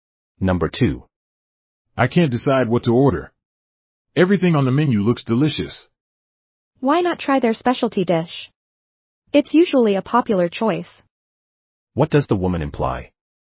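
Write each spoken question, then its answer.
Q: What does the woman imply?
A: The man should try the restaurant's specialty dish.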